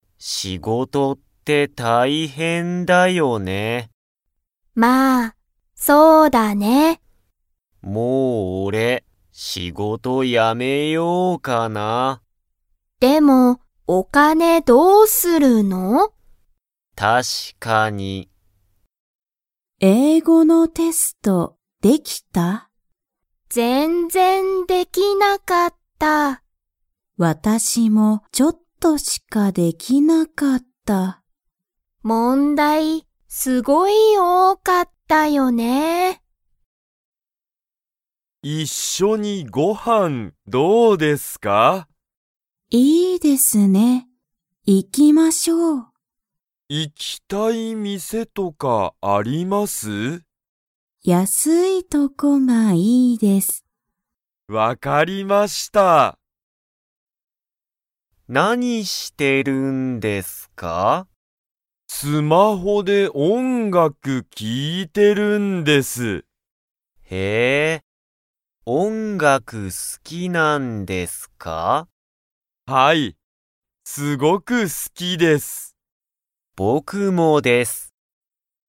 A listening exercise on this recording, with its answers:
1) タカシの仕事しごとは____だ。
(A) 確(たし)か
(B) 問題(もんだい)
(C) 一(いっ)緒(しょ)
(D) 大変(たいへん)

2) ユウコは、英語(えいご)のテストができましたか?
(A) はい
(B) いいえ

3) 高橋(たかはし)さんは、____とこがいい。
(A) 安(やす)い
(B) おいしい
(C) 高(たか)い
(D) 多(おお)い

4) 原(はら)さんは、音楽(おんがく)が好(す)きですか?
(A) はい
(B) いいえ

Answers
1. D
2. B
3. A
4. A

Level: Level 1

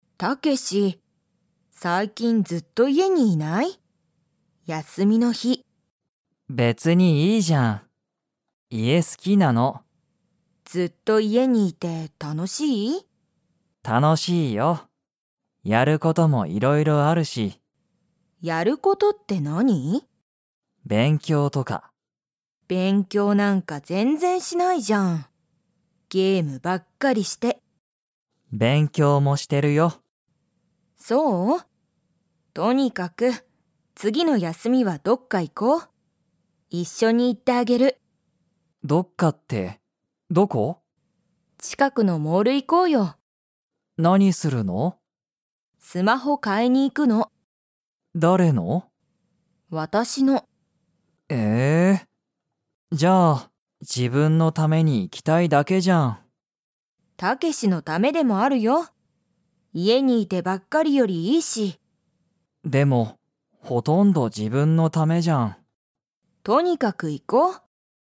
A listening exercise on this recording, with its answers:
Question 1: タケシは、家いえにいるのが好すきですか?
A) はい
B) いいえ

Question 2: カオリは、____に行いきたい。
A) 自分じぶんのお店みせ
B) 前まえの休やすみ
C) 近ちかくのモール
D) 楽たのしい事こと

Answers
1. A
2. C

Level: Level 2

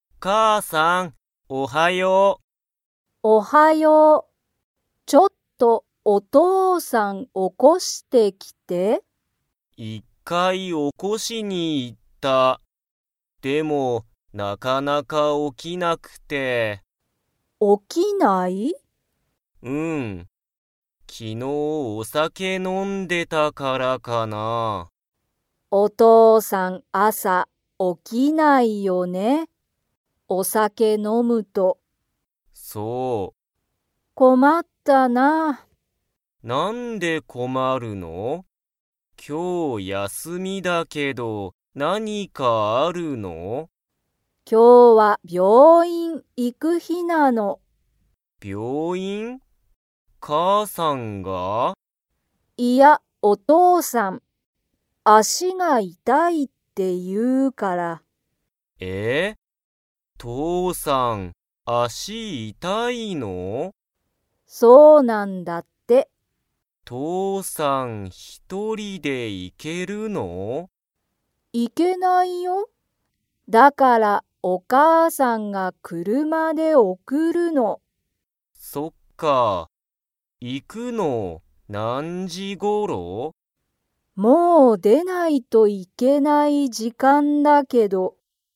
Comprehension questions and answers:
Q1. お父とうさんは 。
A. すぐ起おきた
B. なかなか起おきない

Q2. 足あしが痛いたいのは、誰だれですか?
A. お母かあさん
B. お父とうさん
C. マサト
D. マサトの友達ともだち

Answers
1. B
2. B

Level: Level 3

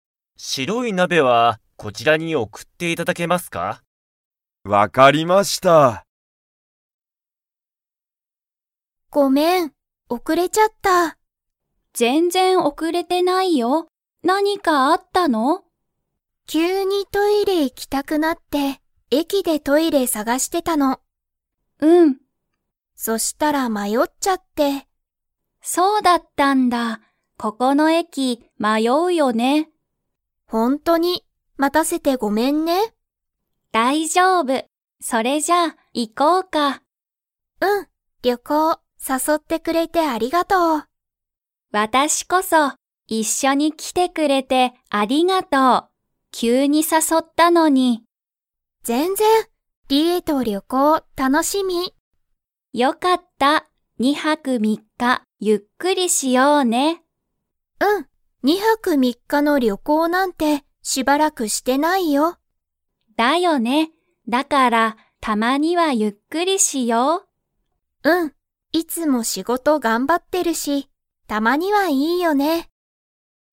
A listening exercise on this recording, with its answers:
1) マキは、駅えきで 。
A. 迷まよった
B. 迷まよわなかった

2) 誰だれが旅行りょこうに誘さそいましたか?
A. リエ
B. マキ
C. リエのお母かあさん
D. マキの友達ともだち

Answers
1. A
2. A

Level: Level 4

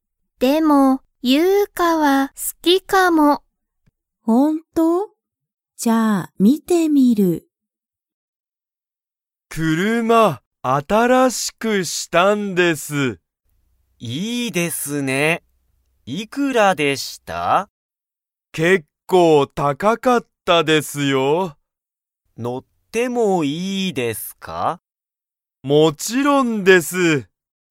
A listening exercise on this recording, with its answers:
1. タカシの車(くるま)は____。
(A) 面白(おもしろ)かった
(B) 高(たか)かった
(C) おいしかった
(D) 長(なが)かった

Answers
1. B

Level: Level 1

